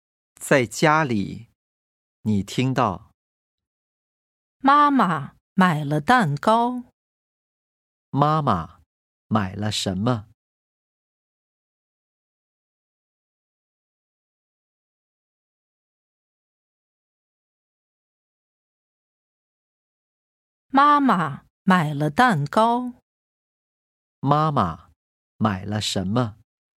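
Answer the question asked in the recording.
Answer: 蛋糕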